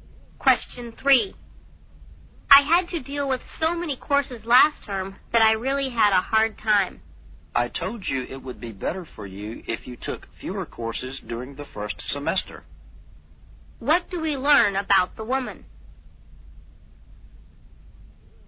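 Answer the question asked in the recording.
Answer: She took too many courses last term and had a hard time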